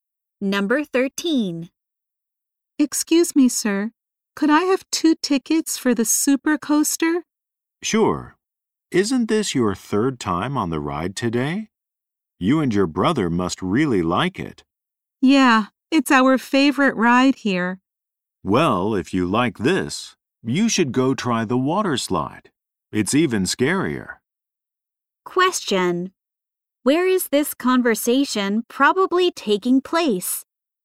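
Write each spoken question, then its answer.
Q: Where is this conversation probably taking place?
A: At an amusement park.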